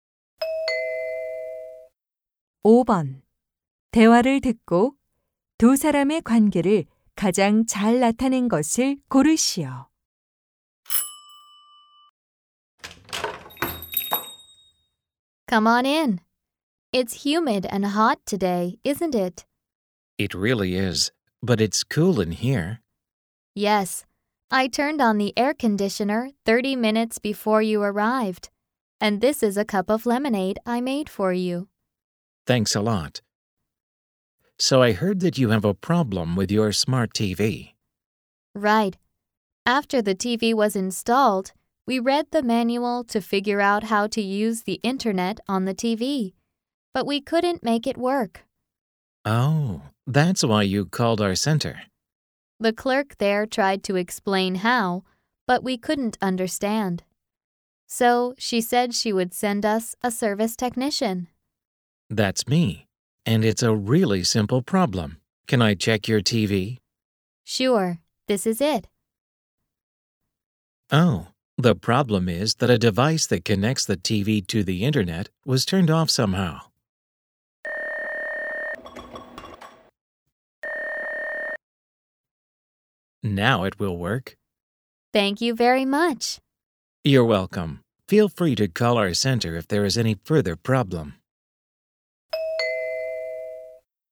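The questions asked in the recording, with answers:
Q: 대화를 듣고 두 사람의 관계를 가장 잘 나타낸 것을 고르시오.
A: 고객 - TV 수리 기사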